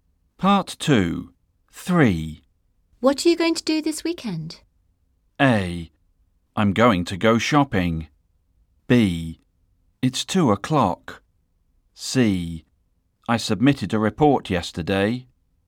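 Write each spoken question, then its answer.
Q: What are you going to do this weekend?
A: A: I'm going to go shopping.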